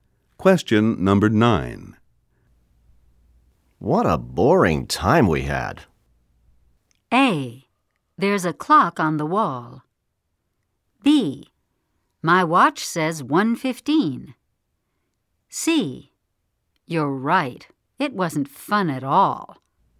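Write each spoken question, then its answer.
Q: What a boring time we had.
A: C: You're right. It wasn't fun at all.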